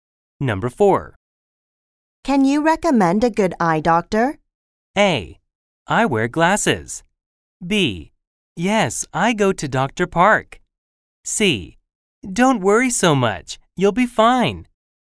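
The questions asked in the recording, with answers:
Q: Can you recommend a good eye doctor?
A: B: Yes, I go to Dr. Park.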